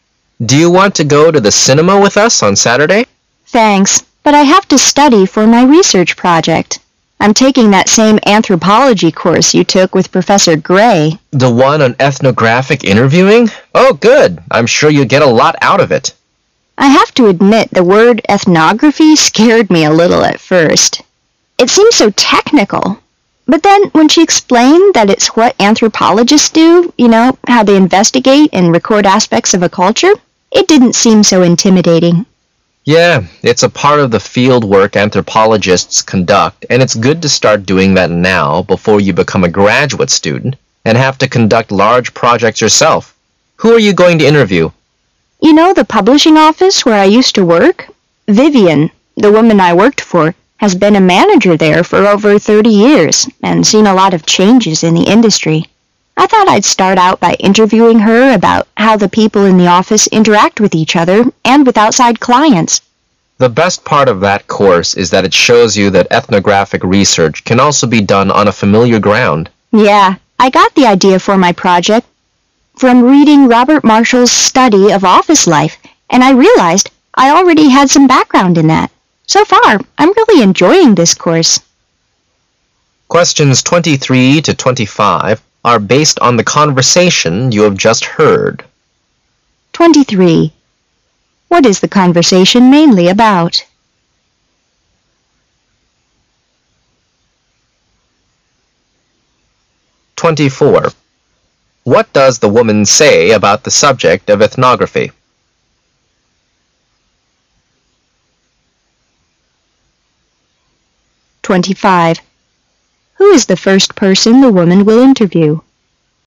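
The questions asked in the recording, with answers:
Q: What is the conversation mainly about?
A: The woman's research project for an anthropology course on ethnographic interviewing

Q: What does the woman say about the subject of ethnography?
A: It seemed technical and intimidating at first, but less so once it was explained

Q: Who is the first person the woman will interview?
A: Vivian, her former manager at the publishing office

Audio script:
[解析] 23-25 M: Do you want to go to the cinema with us on Saturday? W: Thanks, but I have to study for my research project. I'm taking that same anthropology course you took with Professor Gray. M: The one on ethnographic interviewing? Oh, good! I'm sure you'll get a lot out of it. W: I have to admit the word "ethnography" scared me a little at first. It seems so technical. But then when she explained that it's what anthropologists do, you know, how they investigate and record aspects of a culture, it didn't seem so intimidating! 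M: Yeah, it's a part of the field work anthropologists conduct and it's good to start doing that now before you become a graduate student and have to conduct large projects yourself. Who are you going to interview? W: You know the publishing office where I used to work? Vivian. the woman I worked for, has been a manager there for over 30 years and seen a lot of changes in the industry. I thought I'd start out by interviewing her about how the people in the office interact with each other and with outside clients. M: The best part of that course is that it shows you that ethnographic research can also be done on a familiar ground. W: Yeah. I got the idea for my project from reading Robert Marshal's study of office life and I realized I already had some background in that. So far, I'm really enjoying this course.
[解析] Who is the first person the woman will interview?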